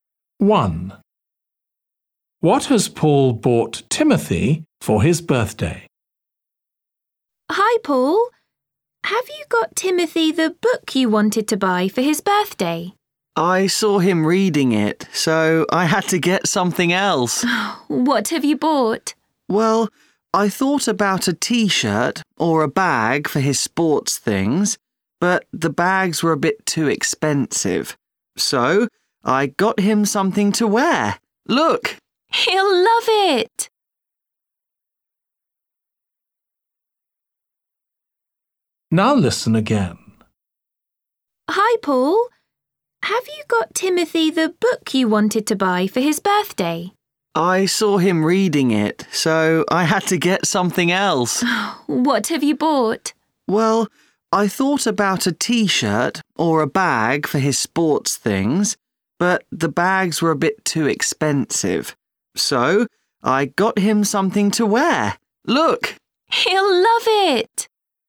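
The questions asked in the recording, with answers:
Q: What has Paul bought Timothy for his birthday?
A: a T-shirt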